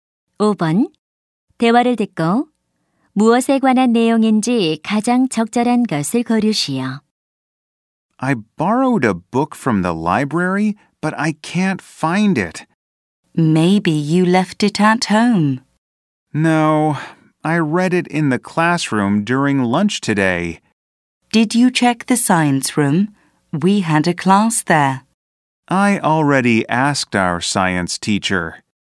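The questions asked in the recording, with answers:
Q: 대화를 듣고 무엇에 관한 내용인지 가장 적절한 것을 고르시오.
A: 잃어버린 도서관 책 찾기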